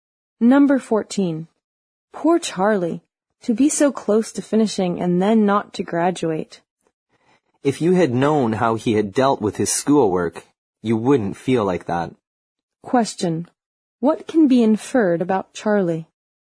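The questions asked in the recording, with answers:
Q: What can be inferred about Charlie?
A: He didn't work hard at school, so he deserved not to graduate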